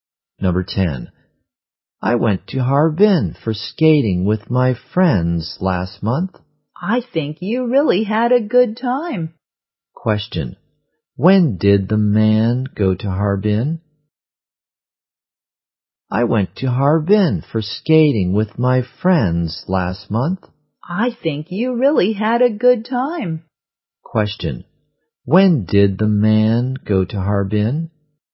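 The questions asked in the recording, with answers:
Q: When did the man go to Harbin?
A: Last month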